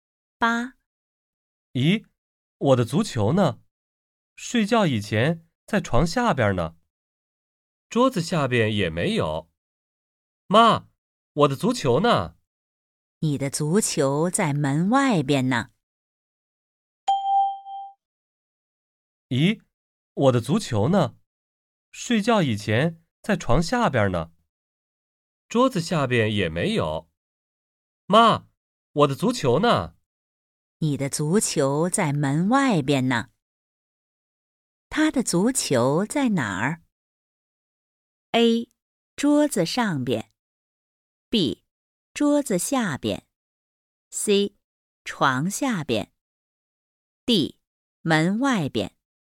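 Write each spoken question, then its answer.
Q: 他的足球在哪儿?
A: D: 门外边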